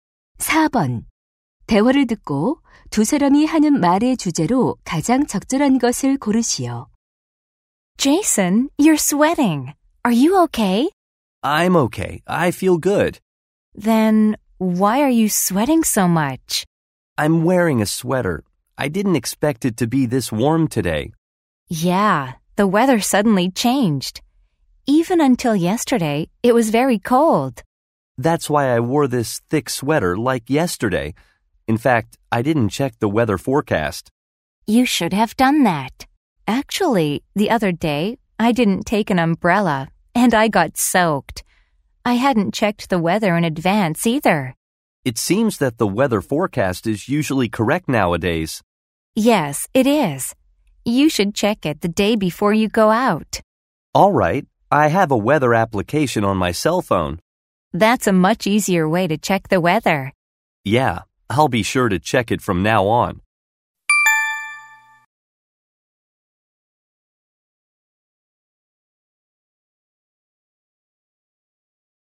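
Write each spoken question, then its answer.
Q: 대화를 듣고 두 사람이 하는 말의 주제로 가장 적절한 것을 고르시오.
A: 외출 전 일기 예보 확인의 필요성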